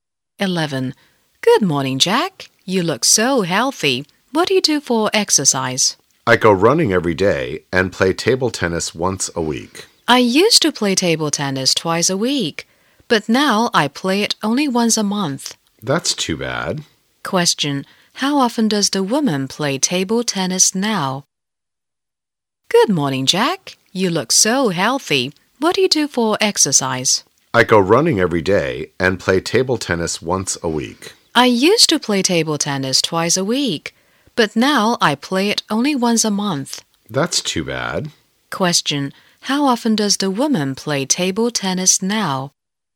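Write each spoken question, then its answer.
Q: how often does the woman play table tennis now?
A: Once a month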